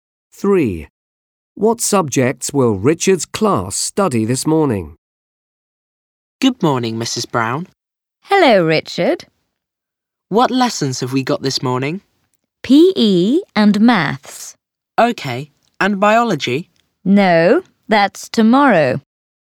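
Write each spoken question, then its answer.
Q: What subjects will Richard's class study this morning?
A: PE and maths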